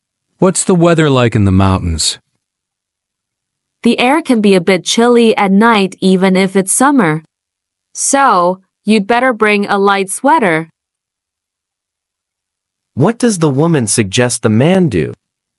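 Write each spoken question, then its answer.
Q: What does the woman suggest the man do?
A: Bring a light sweater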